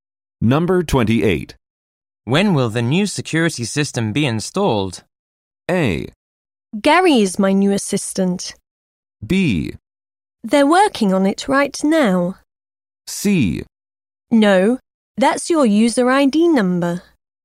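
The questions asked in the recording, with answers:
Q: When will the new security system be installed?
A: B: They're working on it right now.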